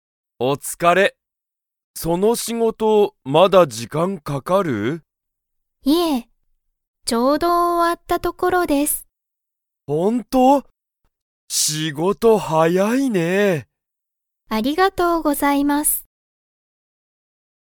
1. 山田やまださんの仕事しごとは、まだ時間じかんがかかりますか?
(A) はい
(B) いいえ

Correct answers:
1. B

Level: Level 1

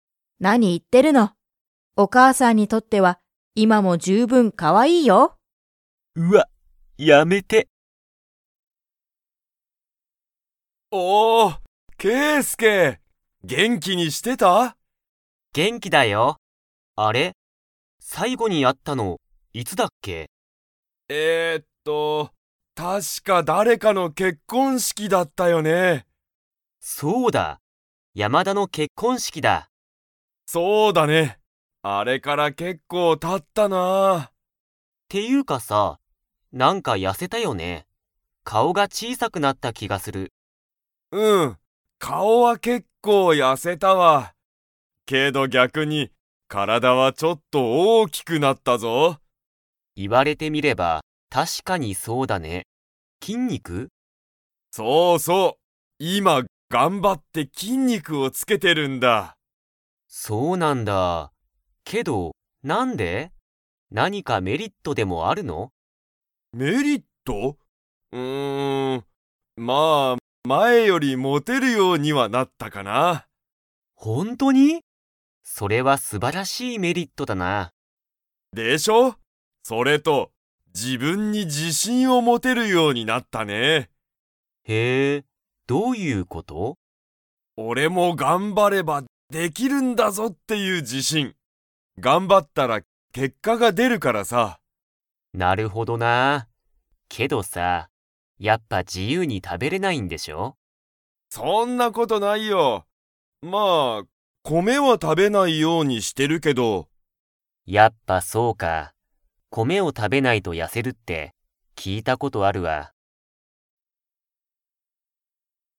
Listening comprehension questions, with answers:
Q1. 2人ふたりが最後さいごに会あったのは、いつですか?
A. トモアキが痩やせたとき。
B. トモアキが自信じしんをもったとき。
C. 山田やまだの結婚式けっこんしき。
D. ケイスケが筋肉きんにくをつけたとき。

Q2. トモアキは、米こめを ようにしている。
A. 食たべる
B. 食たべない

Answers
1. C
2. B

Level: Level 4

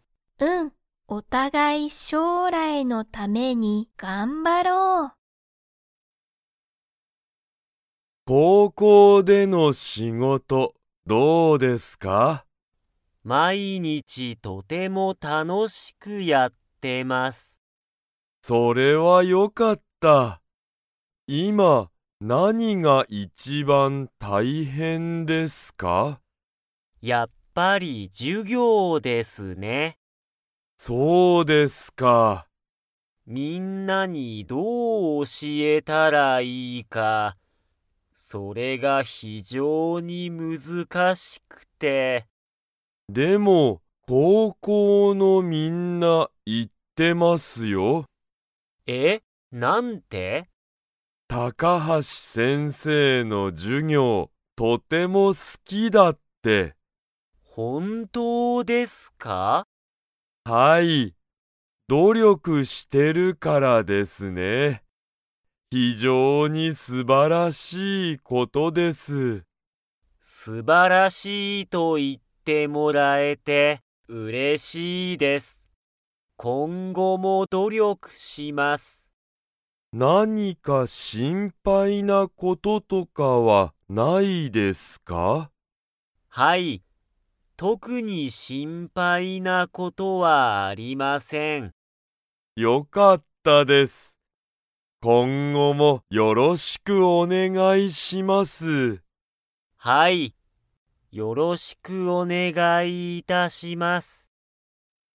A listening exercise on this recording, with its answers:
Comprehension Quiz (Skip if you don't understand the conversation yet)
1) 高橋たかはしさんは今いま、何なにが一番いちばん大変たいへんですか?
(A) 努力どりょく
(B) 心配しんぱい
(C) 授業じゅぎょう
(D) 歴史れきし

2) 高校こうこうのみんなは、高橋たかはしさんの授業じゅぎょうが 。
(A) 好すきだ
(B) 好すきじゃない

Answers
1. C
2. A

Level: Level 3

